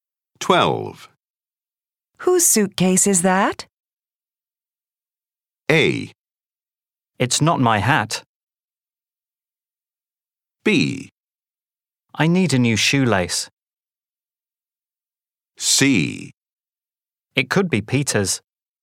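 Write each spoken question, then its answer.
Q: Whose suitcase is that?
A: C: It could be Peter's.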